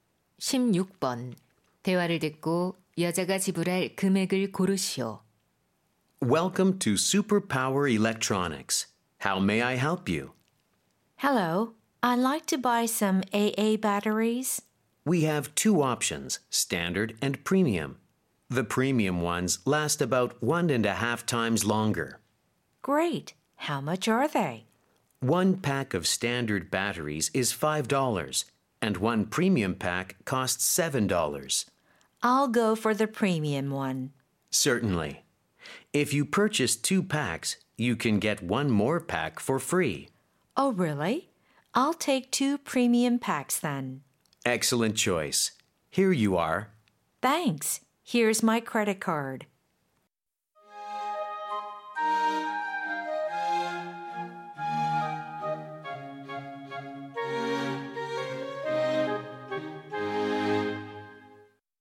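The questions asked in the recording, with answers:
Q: 대화를 듣고 여자가 지불할 금액을 고르시오.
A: $14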